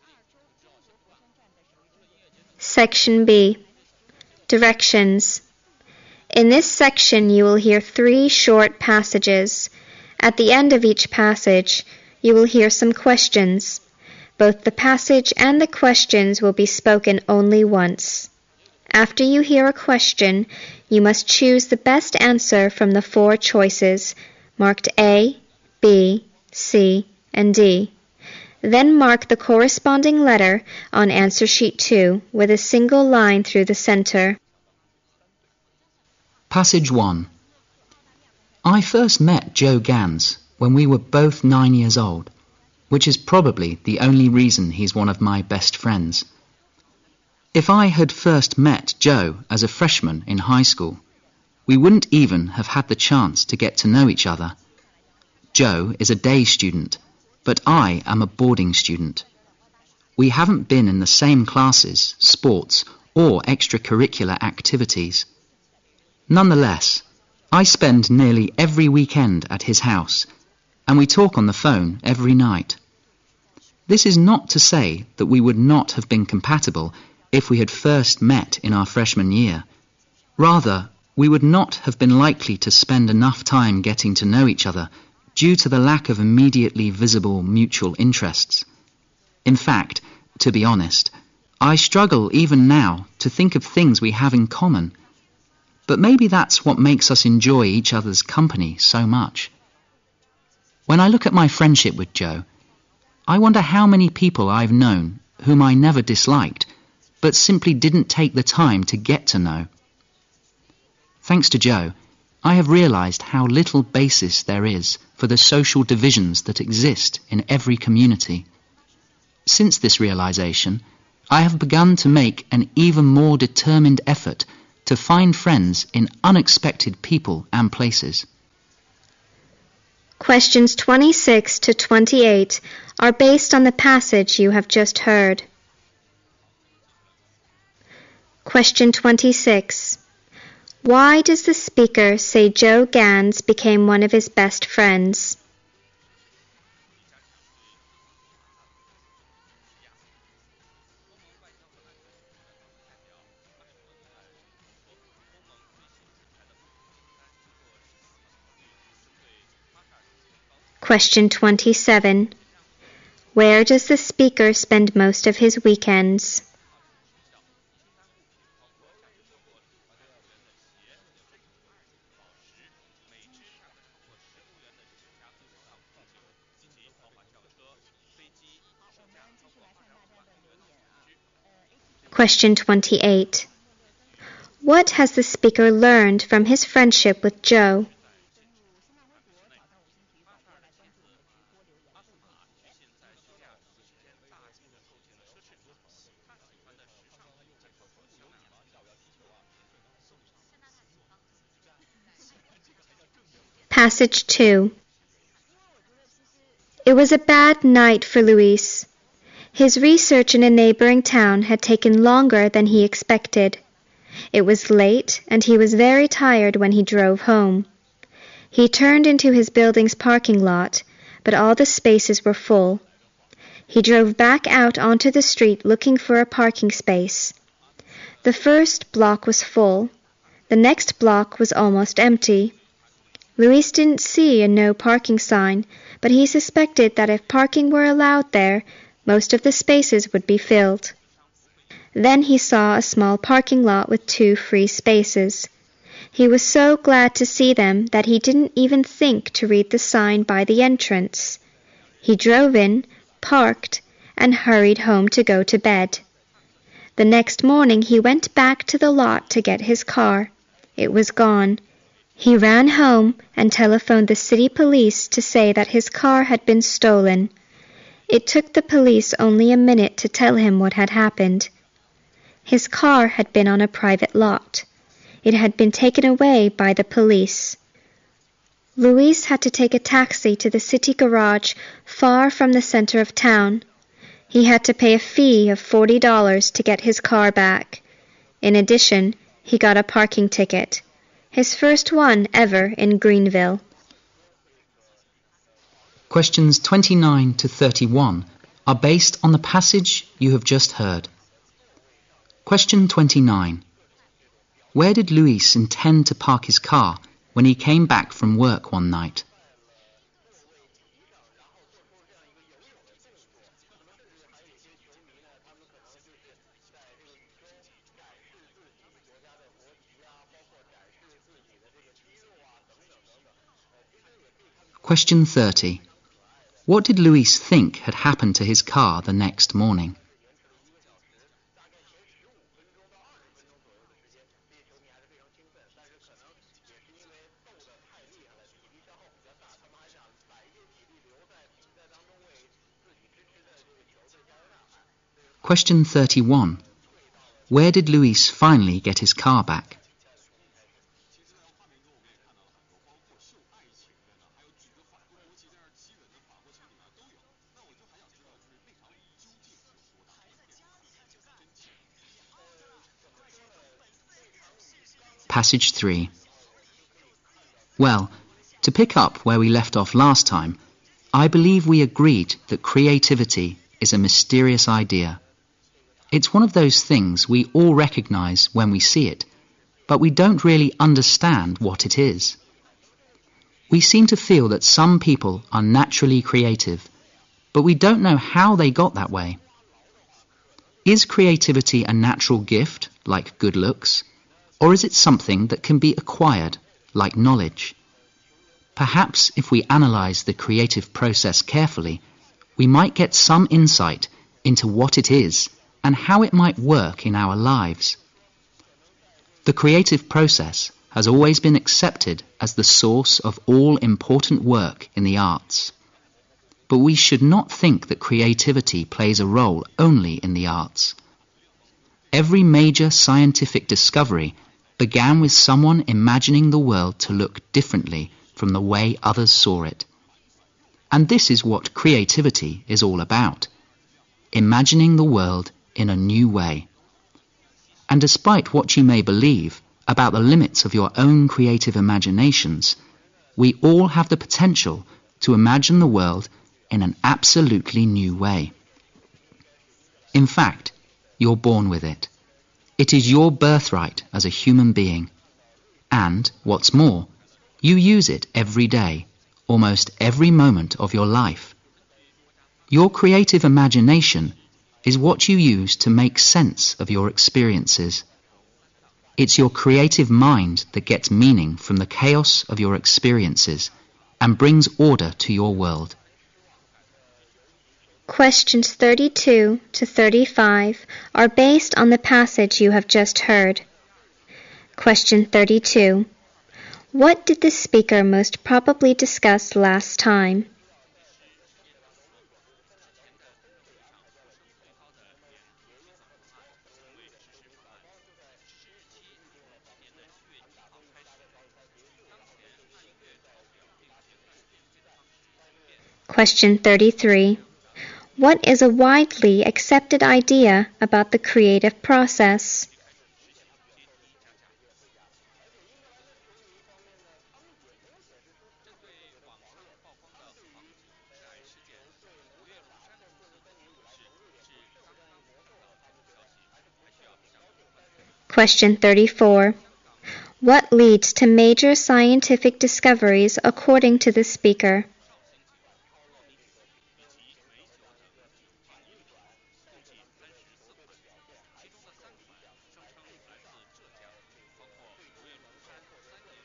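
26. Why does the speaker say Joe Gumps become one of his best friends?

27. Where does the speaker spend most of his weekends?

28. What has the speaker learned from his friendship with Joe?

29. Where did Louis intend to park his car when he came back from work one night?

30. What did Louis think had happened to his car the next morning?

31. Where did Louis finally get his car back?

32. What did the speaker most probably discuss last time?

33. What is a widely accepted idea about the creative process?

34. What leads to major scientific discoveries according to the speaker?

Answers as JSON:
{"26": "Because they met when they were nine.", "27": "At Joe's house.", "28": "There is little basis for social divisions.", "29": "In his building's parking lot.", "30": "It had been stolen.", "31": "At the city garage.", "32": "Creativity as a mysterious idea.", "33": "It is the source of all important work in the arts.", "34": "Imagining the world differently from others."}

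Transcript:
I first met Joe Gumps when we were both 9 years old, which is probably the only reason he is one of my best friends. If I had first met Joe as a freshman in high school, we wouldn't even have had the chance to get to know each other. Joe is a day student, but I am a boarding student. We haven't been in the same classes, sports or extra curriculum activities. Nonetheless, I spend nearly every weekend at his house, and we talk on the phone every night. This is not to say that we would not have been compatible if we had first met in our freshman year. Rather, we would not have been likely to spend enough time getting to know each other, due to the lack of immediately visible mutual interests.
In fact, to be honest, I struggle even now to think of things we have in common, but maybe that's what makes us enjoy each other's company so much. When I look at my friendship with Joe, I wonder how many people I've known whom I never disliked but simply didn't take the time to get to know. 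Thanks to Joe, I have realized how little basis there is, for the social divisions that exist in every community. Since this realization, I have begun to make an even more determined effort to find friends in unexpected people and places.
Questions:
Passage 2
It was a bad night for Louis. His research in the neighboring town had taken longer than he expected. It was late and he was very tired when he drove home. He turned into his building's parking lot, but all the spaces were full. He drove back out onto the street looking for a parking space. The first block was full. The next block was almost empty. Louis didn't see a no-parking sign, but he suspected that if parking were allowed there, most of the spaces would be filled. Then he saw a small parking lot with two free spaces. He was so glad to see them that he didn't even think to read the sign by the entrance. He drove in, parked, and hurried home to go to bed. 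The next morning he went back to the lot to get his car. It was gone. He ran home and telephoned the city police to say that his car had been stolen. It took the police only a minute to tell him what had happened. His car had been on a private lot. It had been taken away by the police. Louis had to take a taxi to the city garage far from the center of town. He had to pay a fee of $40 to get his car back. In addition, he got a parking ticket --- his first one ever in Greenville.
Passage 3
Well, to pick up where we left off last time, I believe we agreed the creativity is a mysterious idea. It's one of those things we all recognized when we see it. But we don't really understand what it is. We seem to feel that some people are naturally creative, but we don't know how they got that way. Is creativity a natural gift like good looks? Or is it something that can be acquired like knowledge? Perhaps if we analyze the creative process carefully, we might get some insight into what it is and how it might work in our lives. 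The creative process has always been accepted as a source of all important work in the arts. But we should not think the creativity play the role only in the arts. Every major scientific discovery began with someone imagining the world to look differently from the way others saw it. And this is what the creativity is all about. Imagining the world in a new way, and despite what you may believe about the limits of your own creative imaginations, we all have the potential to imagine the world in an absolute new way.
In fact, you were born with it. It is your birth right as a human being. And what's more, you use it every day almost every moment of your life. Your creative imagination is what you use to make sense of your experiences. It's your creative mind to get the meaning from the chaos of your experiences and brings order to your world.

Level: 四级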